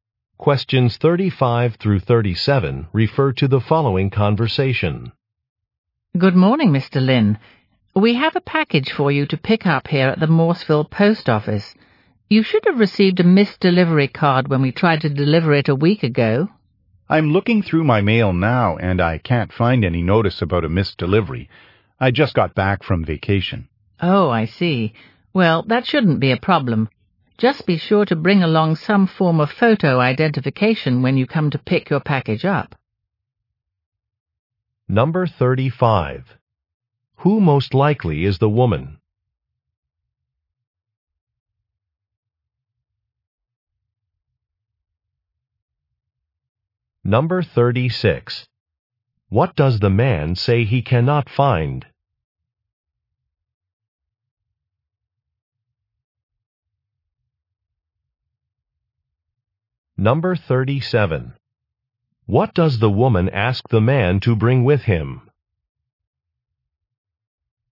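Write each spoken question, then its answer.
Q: Who most likely is the woman?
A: A post office worker

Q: What does the man say he cannot find?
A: A missed delivery notice

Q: What does the woman ask the man to bring with him?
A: Photo identification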